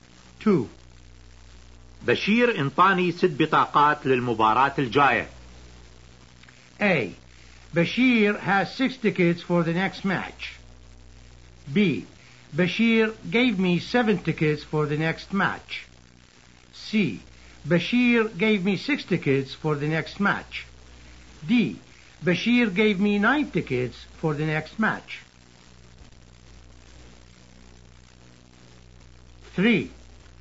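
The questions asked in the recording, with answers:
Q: بشير انطاني 6 بطاقات للمباراة الجاية.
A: C: بشير gave me 6 tickets for the next match.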